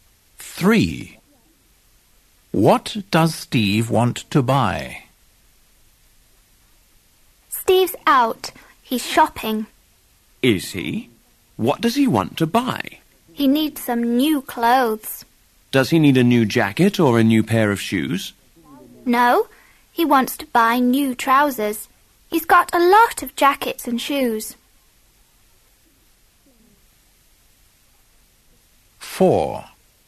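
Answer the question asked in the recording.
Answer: new trousers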